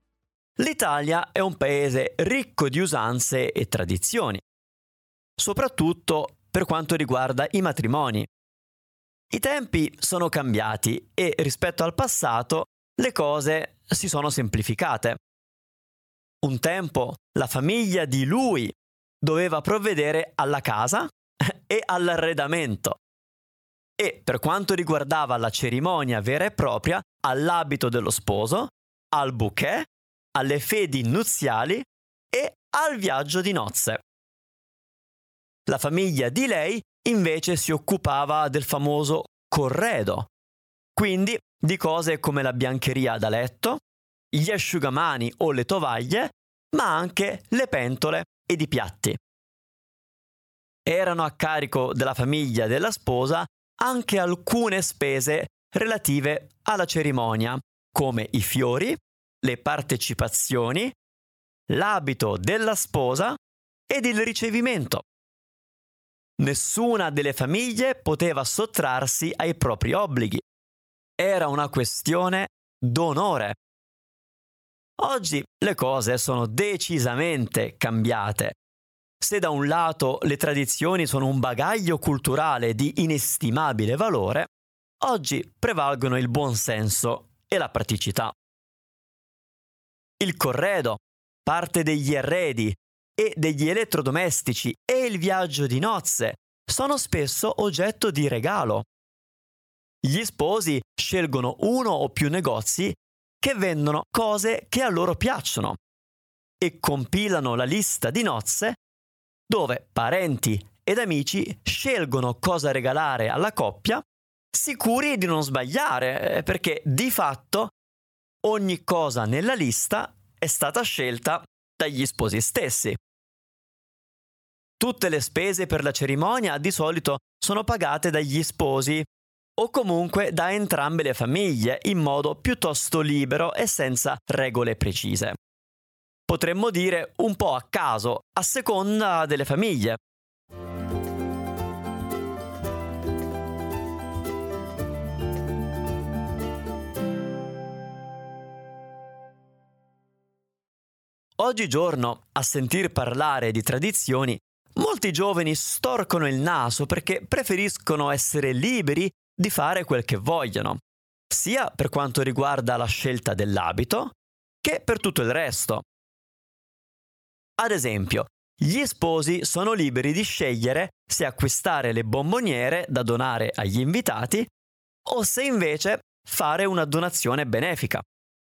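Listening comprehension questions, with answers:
Here are your TRUE/ FALSE Comprehension questions.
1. Le tradizioni riguardo il matrimonio si sono complicate col tempo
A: Falso

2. Un tempo gli sposi compravano insieme la biancheria di casa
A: Falso

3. Il "corredo" sono le decorazioni floreali per la chiesa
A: Falso

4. Oggi gli sposi compilano la lista di nozze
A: Vero

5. Molti giovani dicono di non voler seguire le tradizioni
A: Vero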